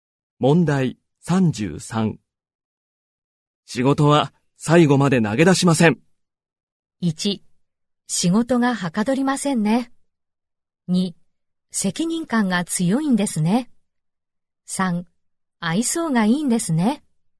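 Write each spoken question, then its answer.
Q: 仕事は最後まで投げ出しません。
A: 2: 責任感が強いんですね。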